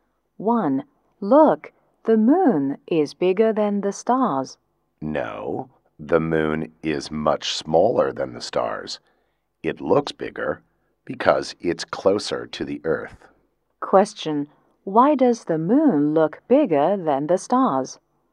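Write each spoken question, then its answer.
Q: Why does the moon look bigger than the stars?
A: Because it's closer to the Earth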